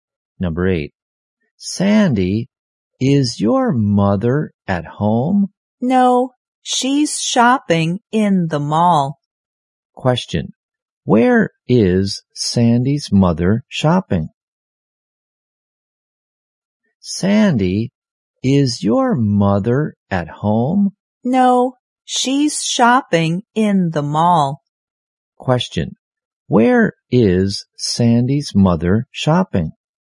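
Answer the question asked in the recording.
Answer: In the mall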